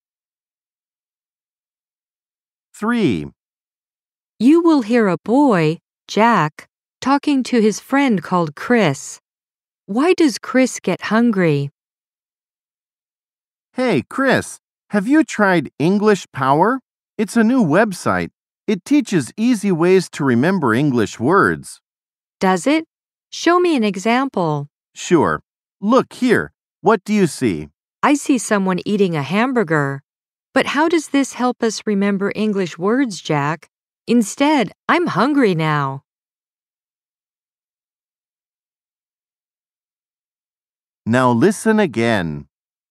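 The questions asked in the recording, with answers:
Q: Why does Chris get hungry?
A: He sees a picture of someone eating a hamburger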